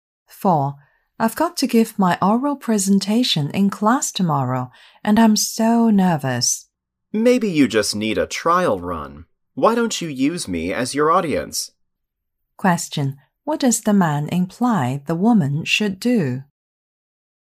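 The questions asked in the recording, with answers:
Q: What does the man imply the woman should do?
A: Practise her presentation in front of him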